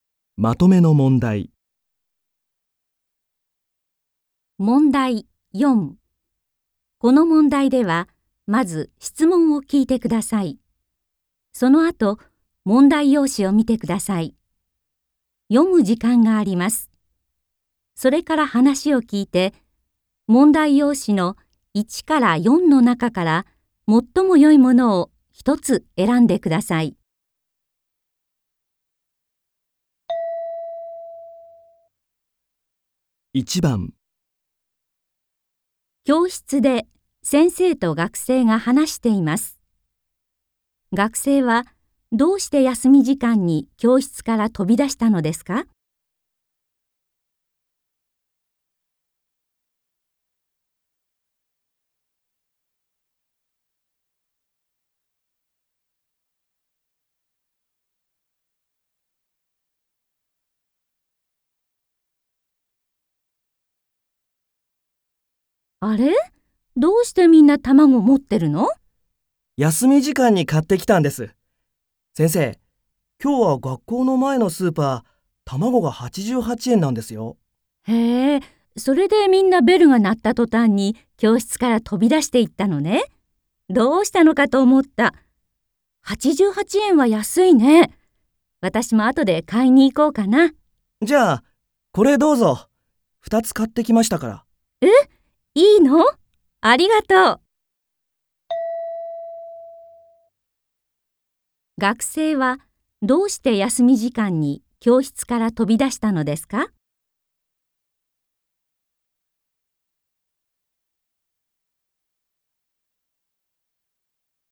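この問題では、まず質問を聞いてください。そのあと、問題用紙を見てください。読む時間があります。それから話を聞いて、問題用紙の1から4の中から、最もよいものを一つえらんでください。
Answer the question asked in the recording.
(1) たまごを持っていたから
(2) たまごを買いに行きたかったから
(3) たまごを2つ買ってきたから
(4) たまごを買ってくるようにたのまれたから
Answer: (2) たまごを買いに行きたかったから

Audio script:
この問題では、まず質問を聞いてください。そのあと、問題用紙を見てください。読む時間があります。それから話を聞いて、問題用紙の1から4の中から、最もよいものを一つえらんでください。
教室で先生と学生が話しています。学生はどうして休み時間に教室から飛び出したのですか。
F:あれ?どうしてみんな卵、持ってるの?
M:休み時間に買って来たんです。先生、今日は学校の前のスーパー、卵が88円なんですよ。
F:へえ、それでみんなベルが鳴ったとたんに教室から飛び出していったのね。どうしたのかと思った。88円は安いね。私もあとで買いに行こうかな。
M:じゃ、これどうぞ。2つ買ってきましたから。
F:え?いいの?ありがとう。

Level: N3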